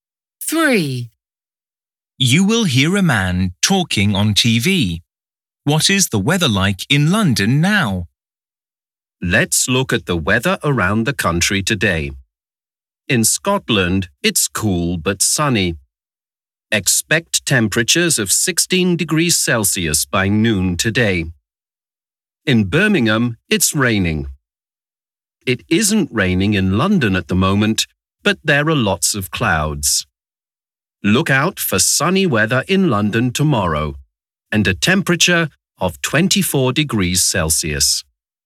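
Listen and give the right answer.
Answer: cloudy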